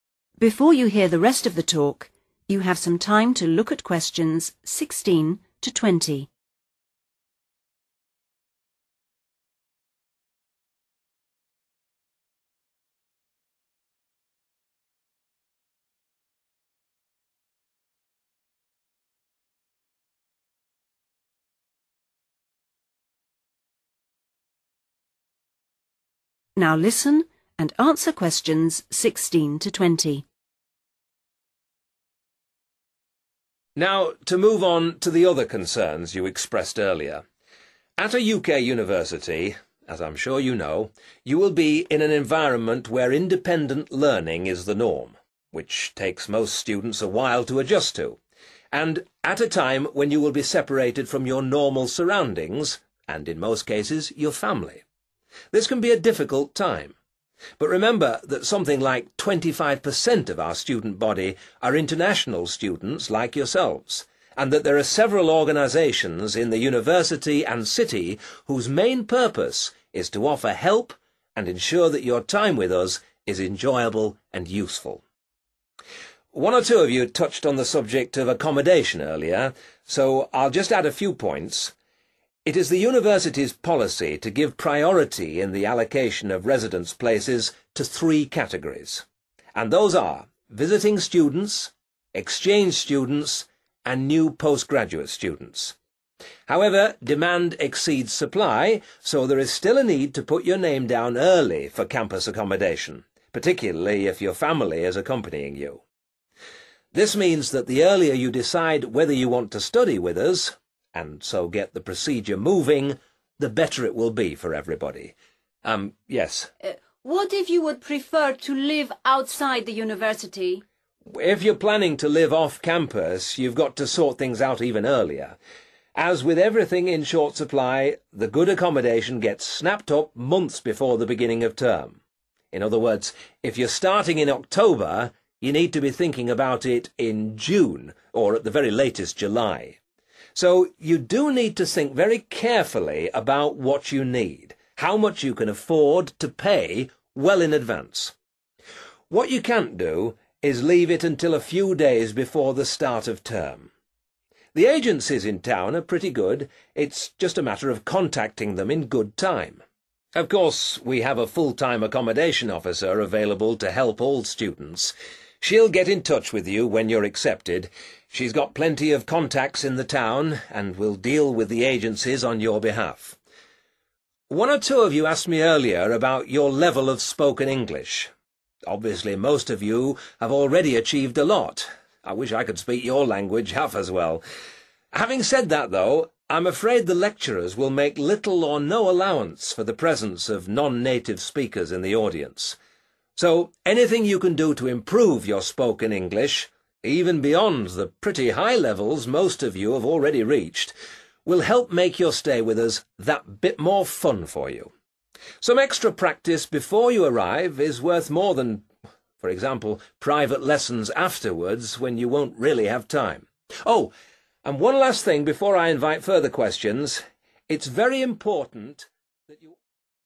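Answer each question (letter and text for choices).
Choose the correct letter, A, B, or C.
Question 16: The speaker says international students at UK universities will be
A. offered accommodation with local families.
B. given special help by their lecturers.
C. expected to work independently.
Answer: C. expected to work independently.

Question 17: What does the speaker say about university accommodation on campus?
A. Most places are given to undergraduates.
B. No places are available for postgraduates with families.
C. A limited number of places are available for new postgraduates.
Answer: C. A limited number of places are available for new postgraduates.

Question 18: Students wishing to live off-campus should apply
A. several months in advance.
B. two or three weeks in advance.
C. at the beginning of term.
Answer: A. several months in advance.

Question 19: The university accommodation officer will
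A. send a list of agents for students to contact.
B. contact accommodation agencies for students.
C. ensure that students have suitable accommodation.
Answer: B. contact accommodation agencies for students.

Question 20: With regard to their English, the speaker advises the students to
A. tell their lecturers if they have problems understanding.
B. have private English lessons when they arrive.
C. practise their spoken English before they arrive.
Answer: C. practise their spoken English before they arrive.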